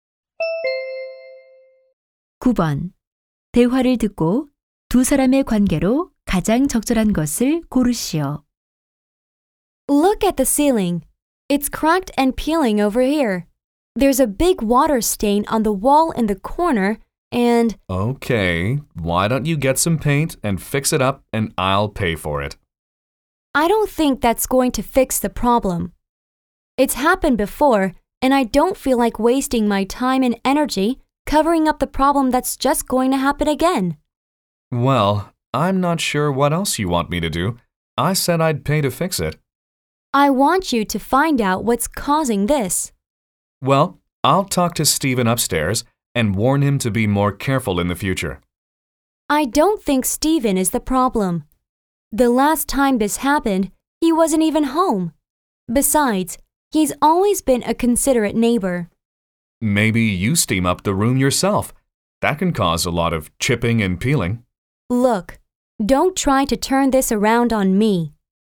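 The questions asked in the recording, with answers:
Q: 대화를 듣고 두 사람의 관계로 가장 적절한 것을 고르시오.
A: 세입자와 집주인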